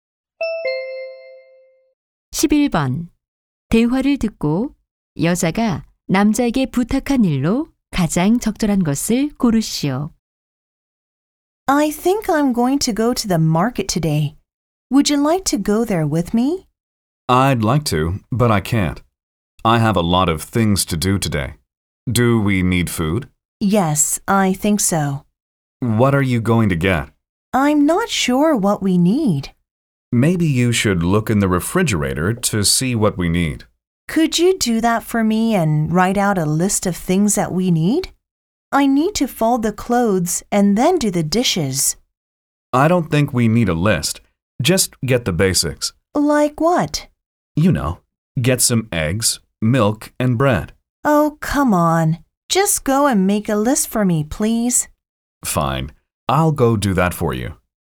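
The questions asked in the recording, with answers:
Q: 대화를 듣고 여자가 남자에게 부탁한 일로 가장 적절한 것을 고르시오.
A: 냉장고를 확인하고 필요한 물건 목록 작성하기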